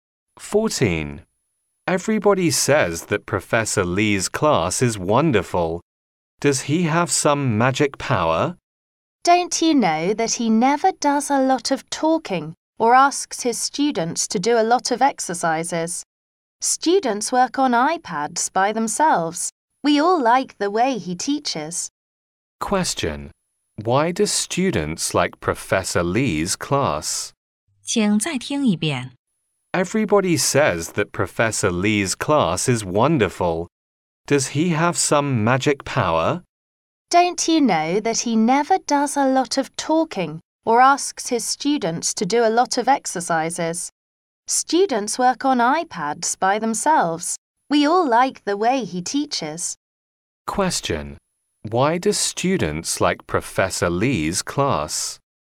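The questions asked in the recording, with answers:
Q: Why do students like Professor Lee's class?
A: Students work on iPads by themselves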